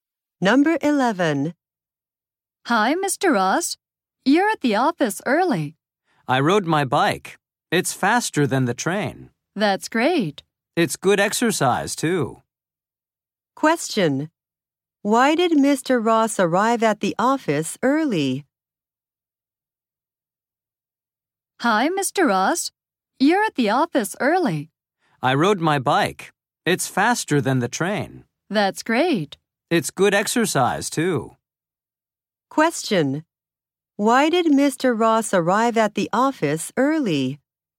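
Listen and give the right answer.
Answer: He rode his bike, which is faster than the train.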